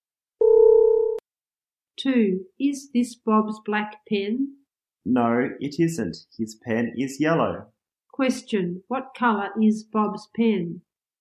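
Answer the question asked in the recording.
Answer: Yellow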